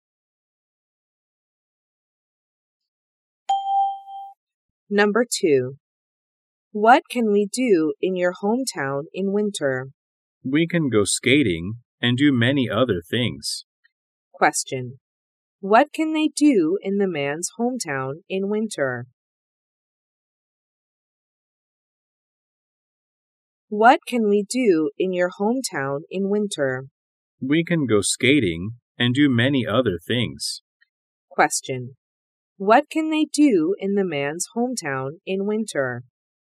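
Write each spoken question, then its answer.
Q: What can they do in the man's hometown in winter?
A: Go skating and do many other things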